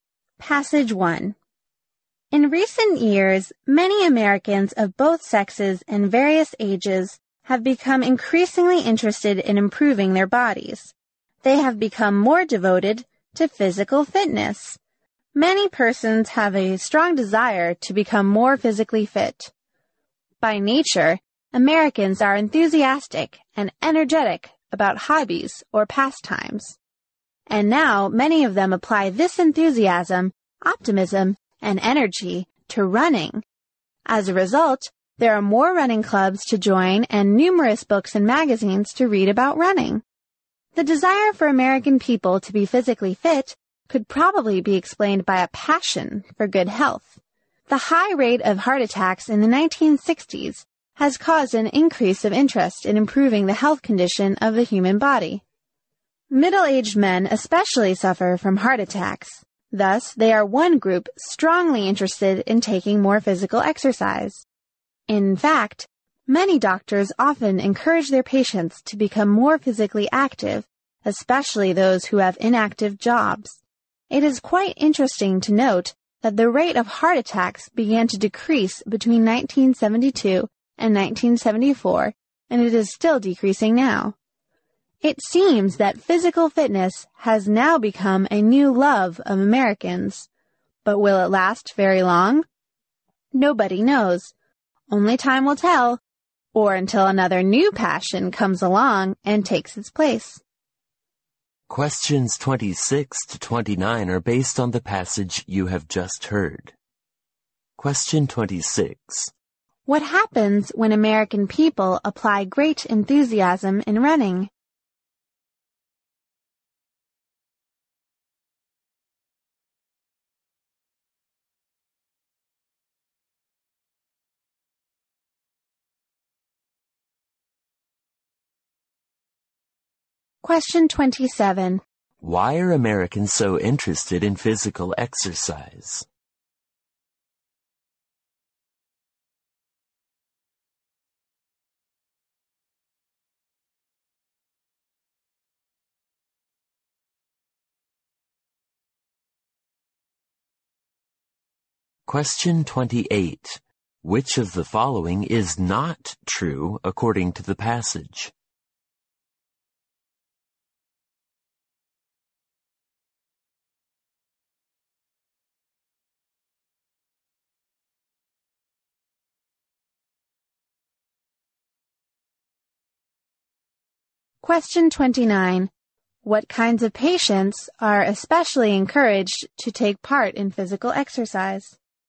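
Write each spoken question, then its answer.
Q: What happens when American people apply great enthusiasm in running?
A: More running clubs, books and magazines about running

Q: Why are Americans so interested in physical exercise?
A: A passion for good health

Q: What kinds of patients are especially encouraged to take part in physical exercise?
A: Those with inactive jobs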